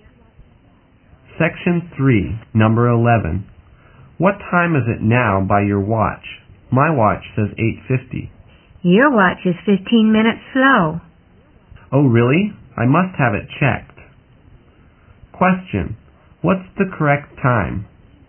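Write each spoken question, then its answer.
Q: What's the correct time?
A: 9:05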